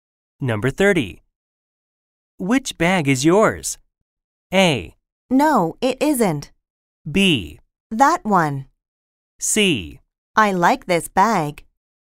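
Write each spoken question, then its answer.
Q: Which bag is yours?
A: B: That one.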